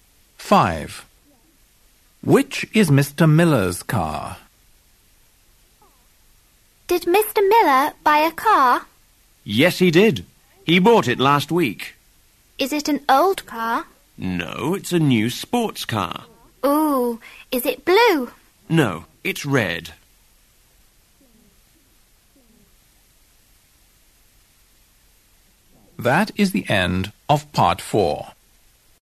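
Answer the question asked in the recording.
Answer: the new red sports car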